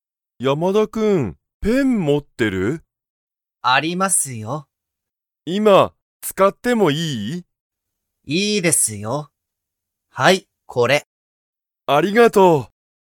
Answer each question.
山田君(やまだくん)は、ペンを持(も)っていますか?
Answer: はい

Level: Level 1